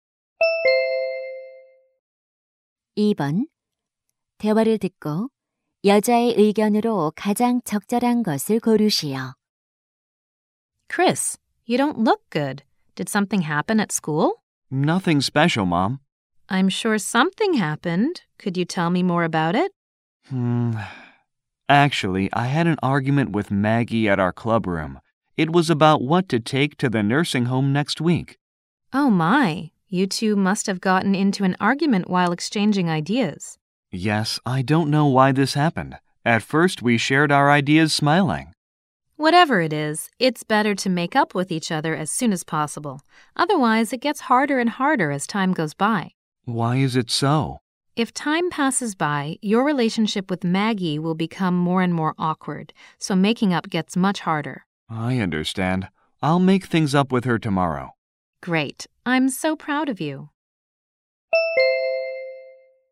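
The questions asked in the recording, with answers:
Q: 대화를 듣고 여자의 의견으로 가장 적절한 것을 고르시오.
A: 다툰 후에는 가능한 한 빨리 화해하는 것이 좋다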